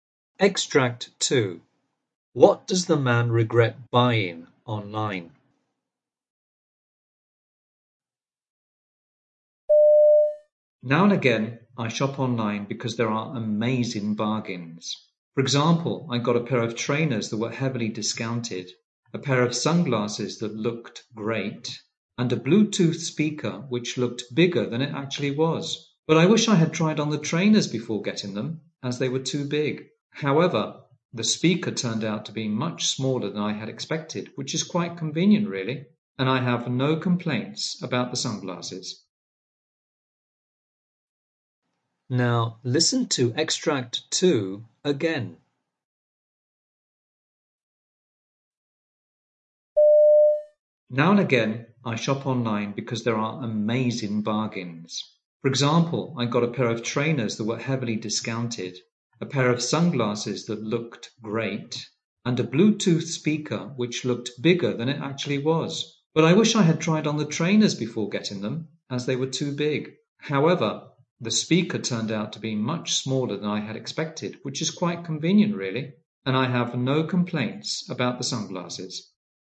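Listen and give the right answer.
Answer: The trainers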